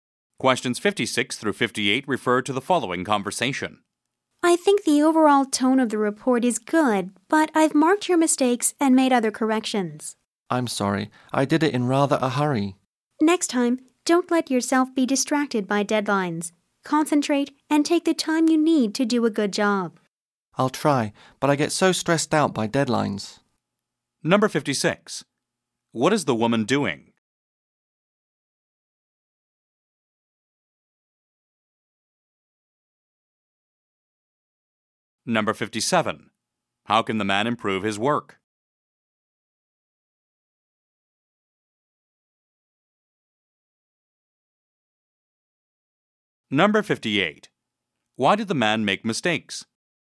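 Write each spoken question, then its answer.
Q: What is the woman doing?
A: Correcting the man's report

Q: How can the man improve his work?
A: Concentrate and take more time

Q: Why did the man make mistakes?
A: He did it in a hurry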